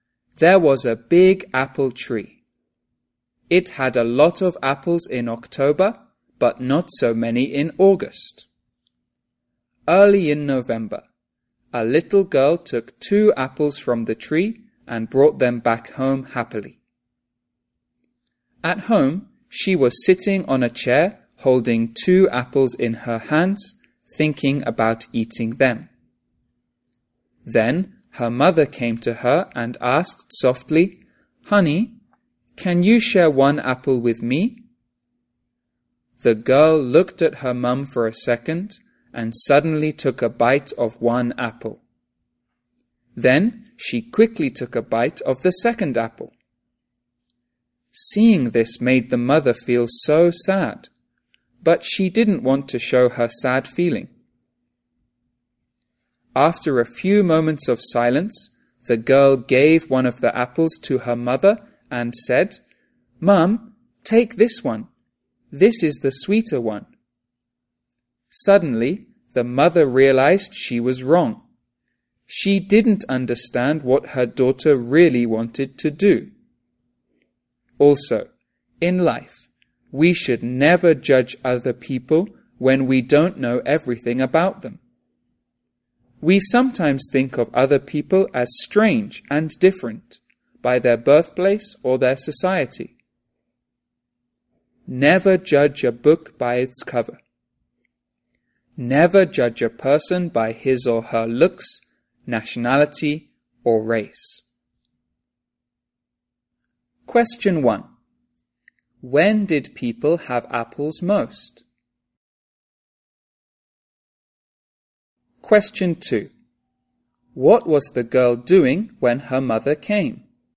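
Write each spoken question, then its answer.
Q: When did people have apples most?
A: In October

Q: What was the girl doing when her mother came?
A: Sitting on a chair holding two apples, thinking about eating them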